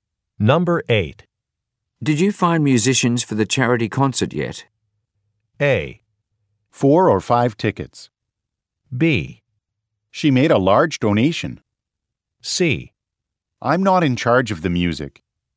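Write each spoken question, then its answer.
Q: Did you find musicians for the charity concert yet?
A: C: I'm not in charge of the music.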